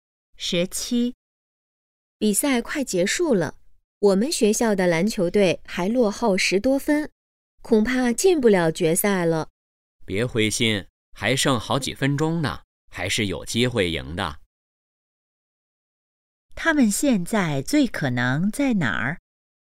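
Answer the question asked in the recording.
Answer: 篮球比赛现场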